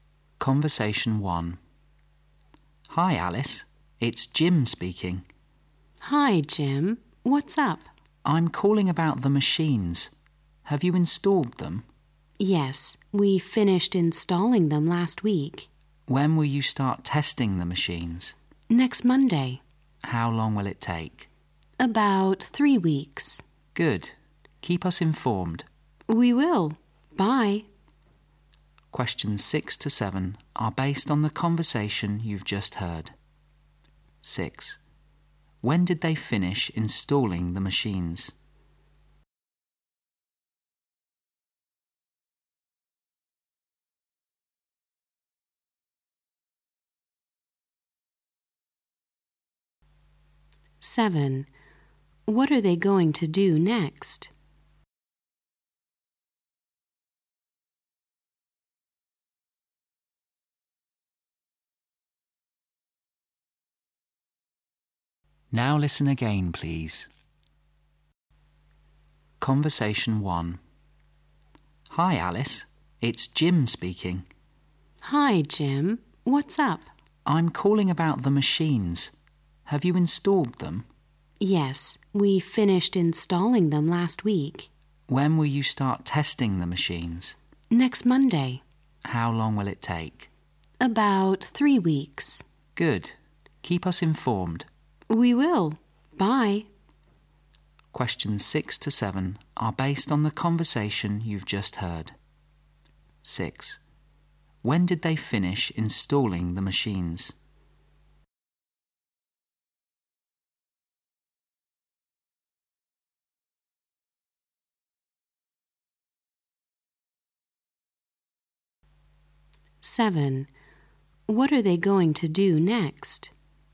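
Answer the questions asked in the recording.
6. Last week.
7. Test the machines.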